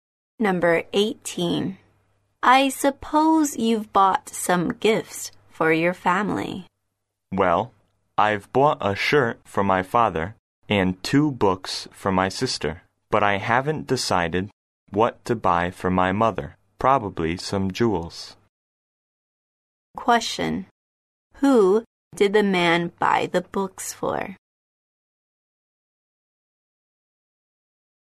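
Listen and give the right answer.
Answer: His sister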